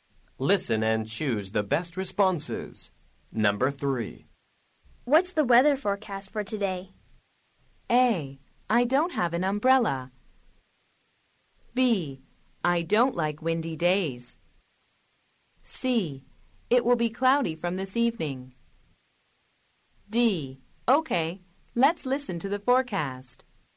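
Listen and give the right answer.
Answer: C: It will be cloudy from this evening.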